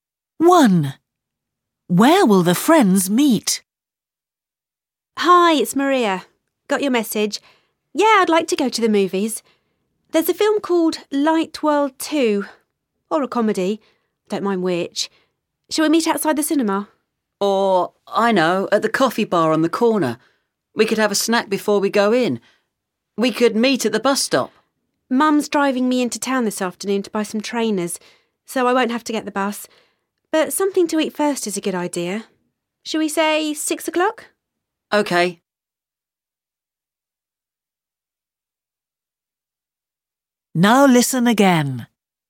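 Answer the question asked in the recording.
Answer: At the coffee bar on the corner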